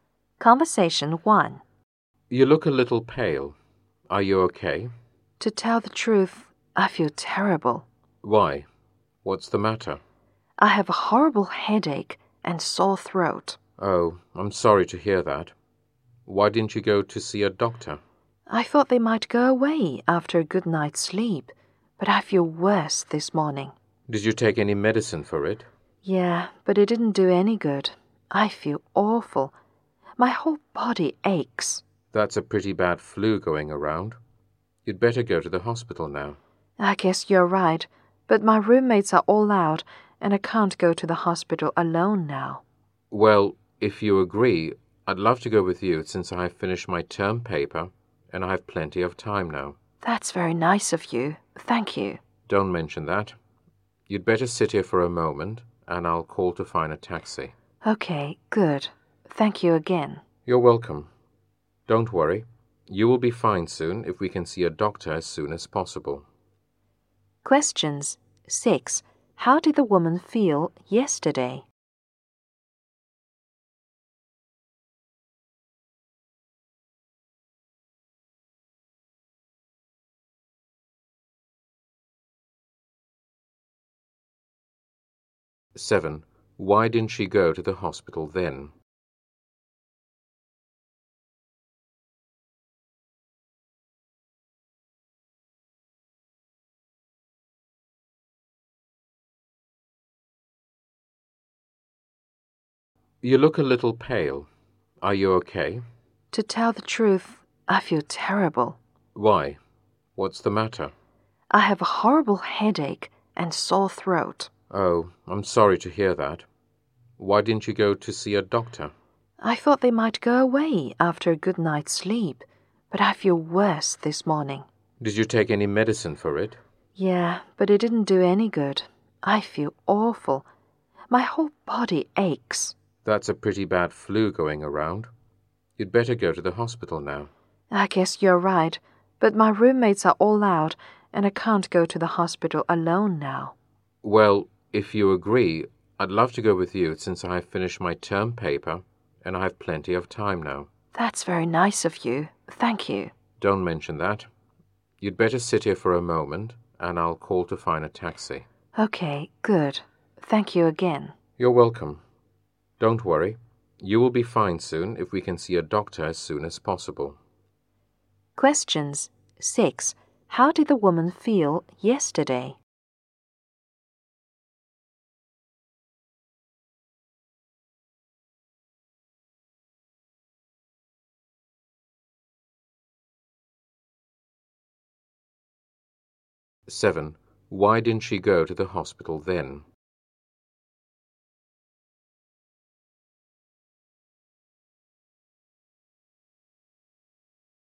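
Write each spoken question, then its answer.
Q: How did the woman feel yesterday?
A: She had a horrible headache and sore throat

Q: Why didn't she go to the hospital then?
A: She thought it would go away after a good night's sleep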